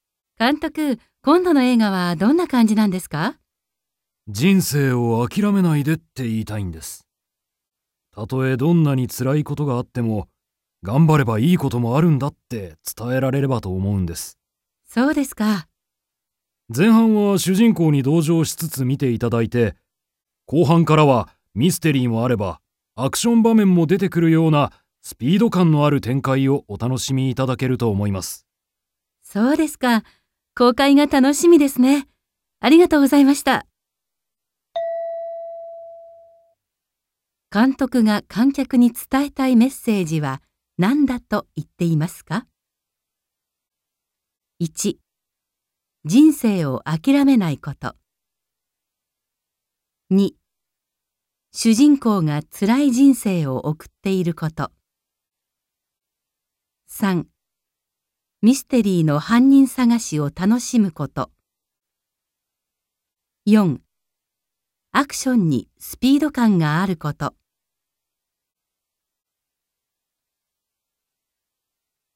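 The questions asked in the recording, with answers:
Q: 監督が観客に伝えたいメッセージは何だと言っていますか?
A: 1: 人生を諦めないこと。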